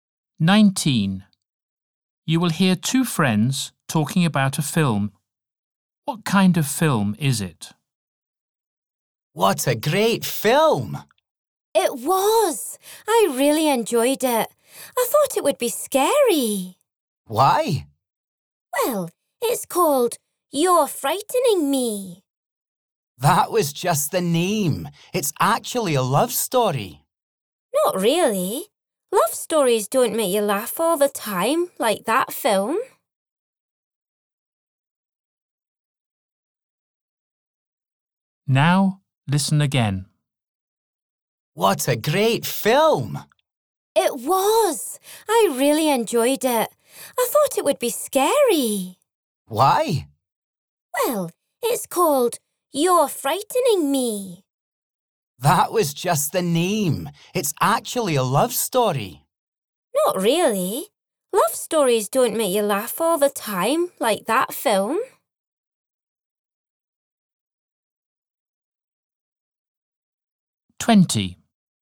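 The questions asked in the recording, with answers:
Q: What kind of film is it?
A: A comedy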